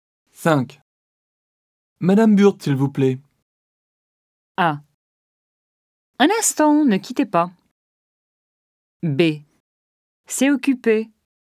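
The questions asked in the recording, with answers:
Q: Madame Burt, s'il vous plaît.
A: A: Un instant, ne quittez pas.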